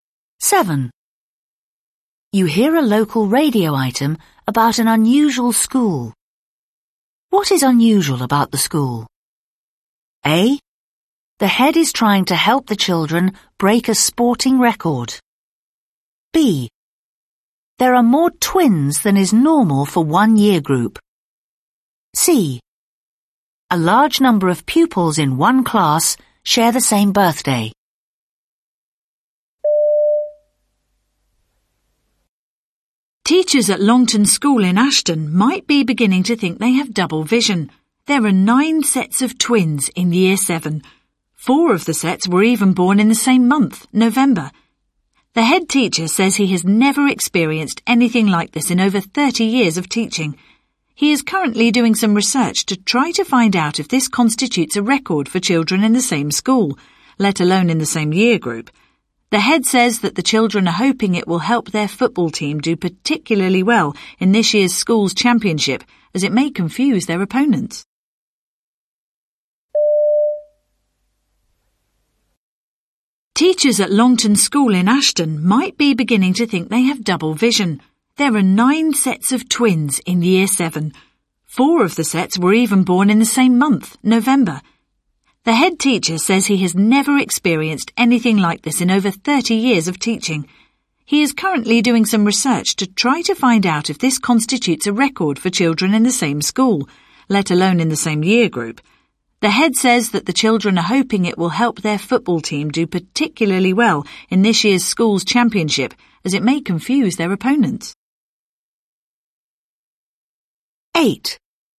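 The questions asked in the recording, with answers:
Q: What is unusual about the school?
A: B: There are more twins than is normal for one year group.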